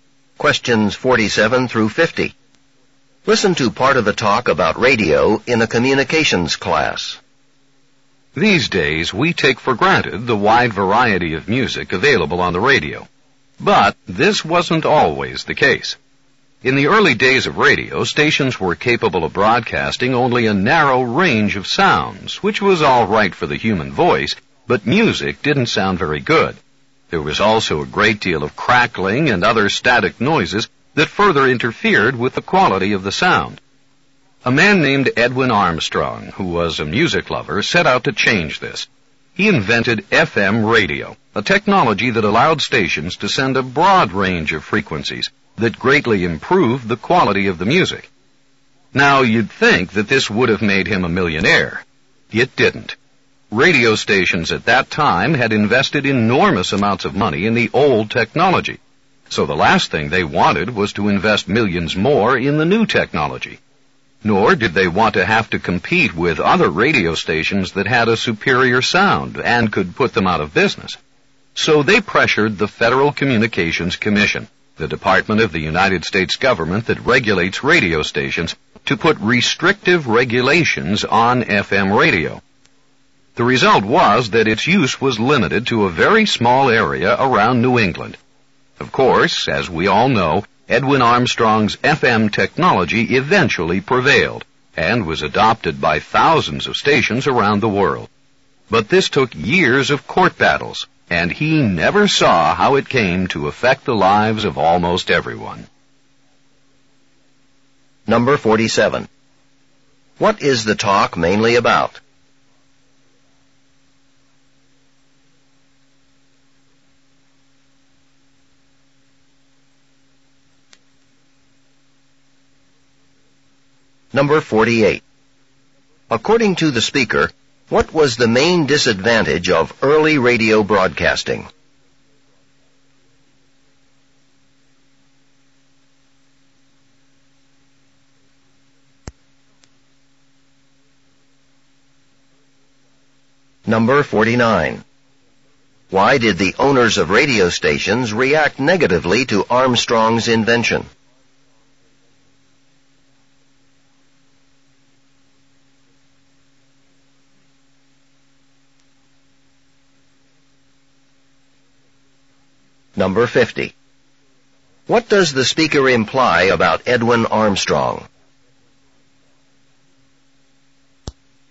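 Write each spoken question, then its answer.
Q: What is the talk mainly about?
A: Edwin Armstrong's invention of FM radio and the resistance to it

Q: According to the speaker, what was the main disadvantage of early radio broadcasting?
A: It could broadcast only a narrow range of sounds, so music sounded poor

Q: Why did the owners of radio stations react negatively to Armstrong's invention?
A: They had invested heavily in the old technology and feared competition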